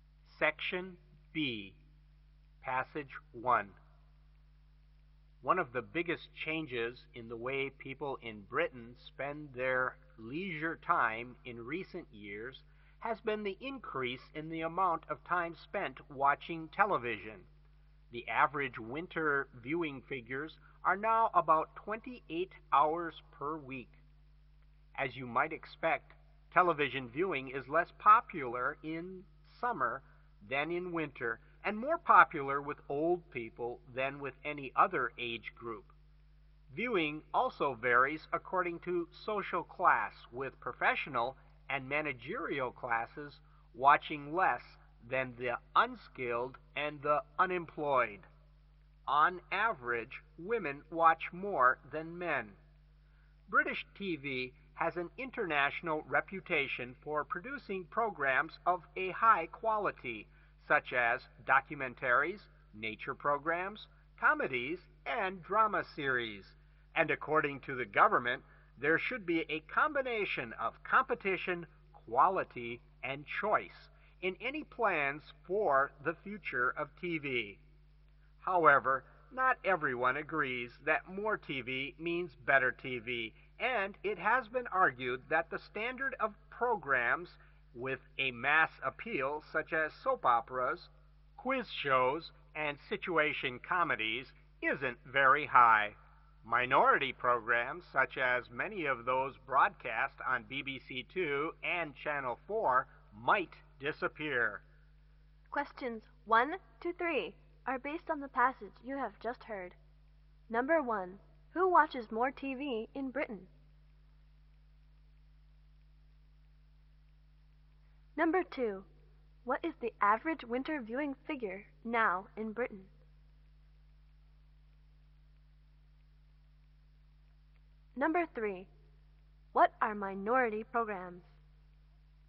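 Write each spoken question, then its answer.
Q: What is the average winter viewing figure now in Britain?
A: About 28 hours per week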